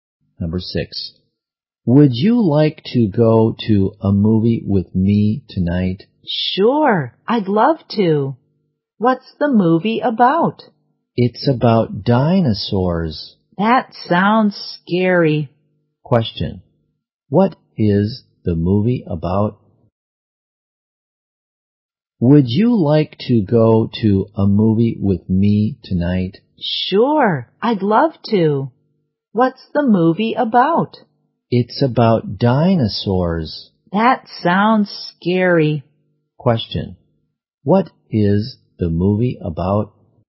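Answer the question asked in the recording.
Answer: Dinosaurs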